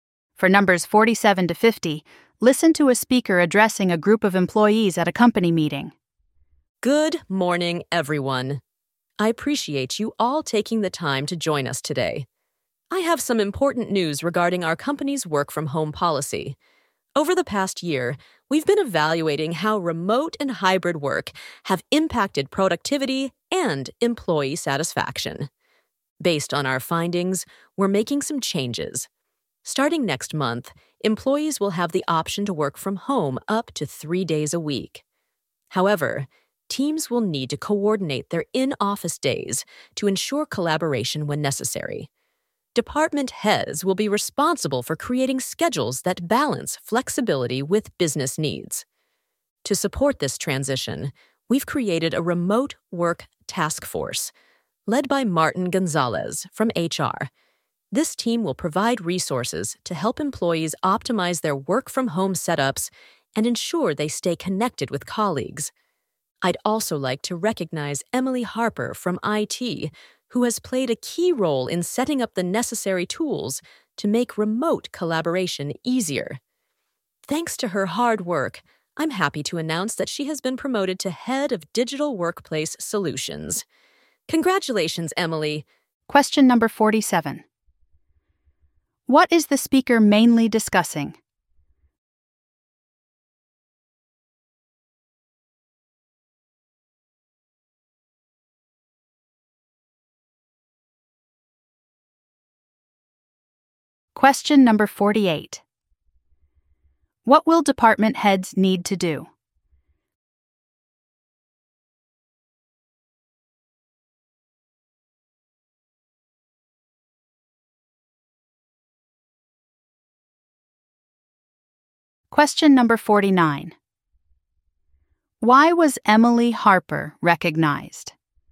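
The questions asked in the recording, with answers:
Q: What is the speaker mainly discussing?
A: Changes to the work-from-home policy

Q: What will department heads need to do?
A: Create schedules balancing flexibility with business needs

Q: Why was Emily Harper recognized?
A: She set up tools for remote collaboration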